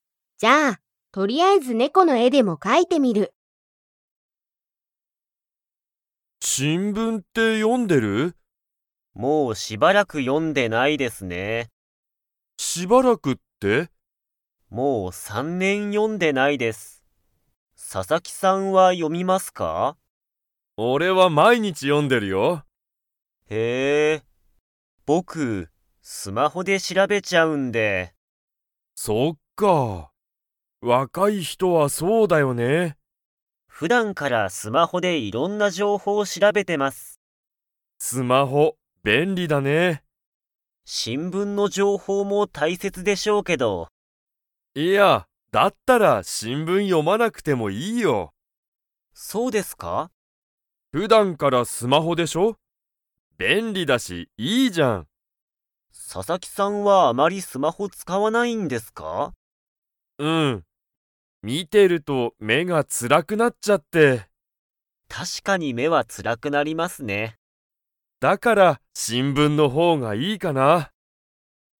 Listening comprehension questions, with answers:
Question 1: 小野田おのださんは でいろんな情報じょうほうを調しらべている。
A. 新聞しんぶん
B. レストラン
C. 会社かいしゃ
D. スマホ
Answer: D. スマホ

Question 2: 佐々木ささきさんは、新聞しんぶんよりスマホの方ほうがいいですか?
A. はい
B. いいえ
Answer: B. いいえ

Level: Level 3

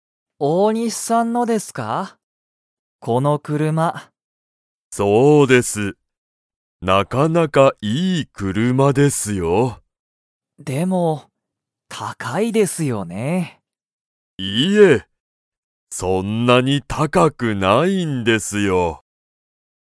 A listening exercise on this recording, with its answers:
Comprehension Quiz (Skip if you don't understand the conversation yet)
大西おおにしさんの車くるまは高たかいですか?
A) はい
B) いいえ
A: B) いいえ

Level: Level 1

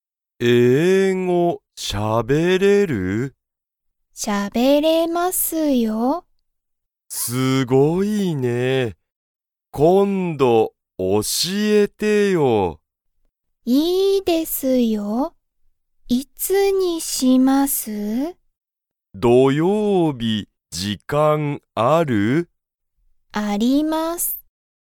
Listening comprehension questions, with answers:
ゆかりはたつやに、英語(えいご)を教(おし)えますか?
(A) はい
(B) いいえ)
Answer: (A) はい

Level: Level 1

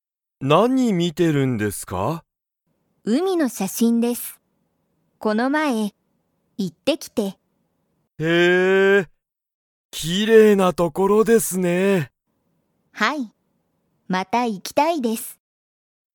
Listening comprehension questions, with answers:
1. 松井まついさんは、____海うみに行いった。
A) この前まえ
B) 今日きょう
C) よく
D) すぐ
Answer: A) この前まえ

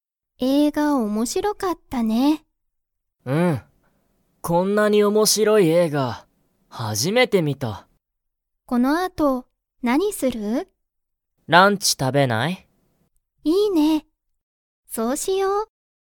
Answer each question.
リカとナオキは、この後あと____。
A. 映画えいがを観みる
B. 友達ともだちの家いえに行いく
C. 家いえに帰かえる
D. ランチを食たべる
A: D. ランチを食たべる

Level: Level 1

